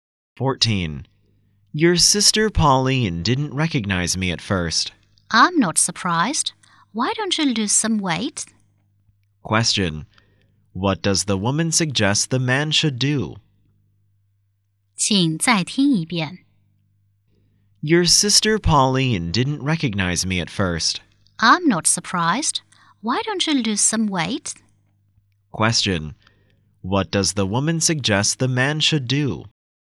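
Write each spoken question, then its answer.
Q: What does the woman suggest the man should do?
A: Lose some weight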